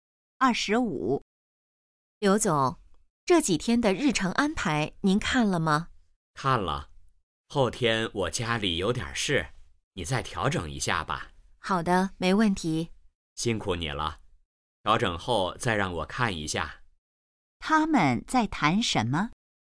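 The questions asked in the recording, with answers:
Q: 他们在谈什么?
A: 日程安排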